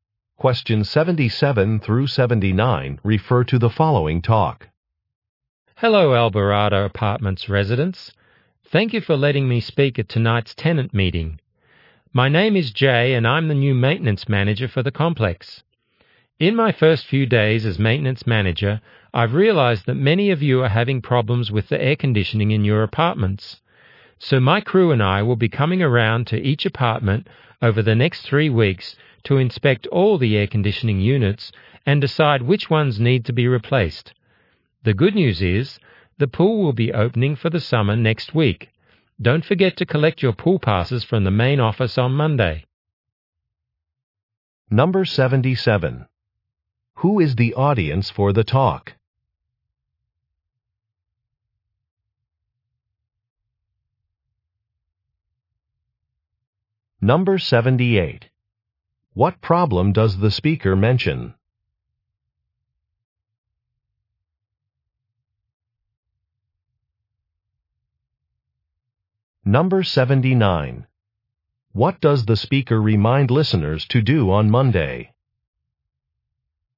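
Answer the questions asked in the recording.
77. Apartment residents (tenants).
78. Problems with the air conditioning.
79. Collect their pool passes from the main office.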